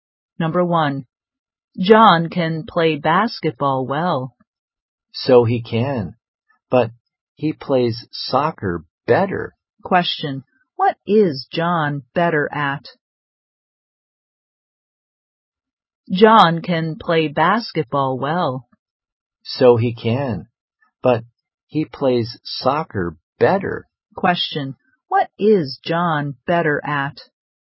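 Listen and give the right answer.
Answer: Soccer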